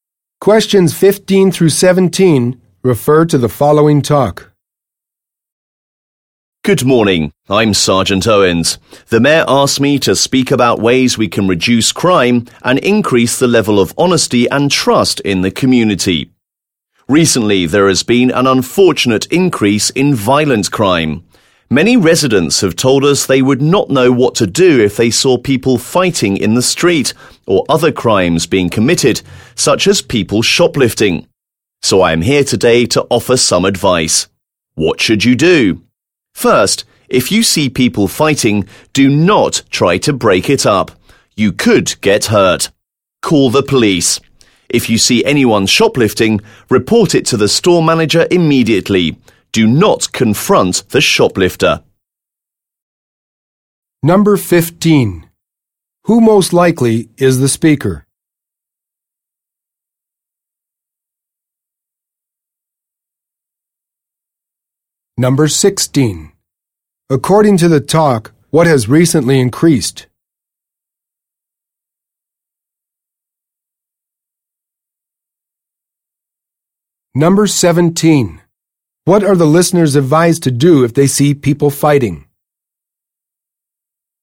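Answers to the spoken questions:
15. A police officer
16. Violent crime
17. Call the police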